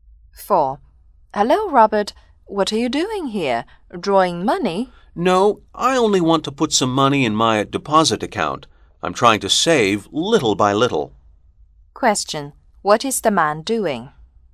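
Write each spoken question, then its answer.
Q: What is the man doing?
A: Putting money into his deposit account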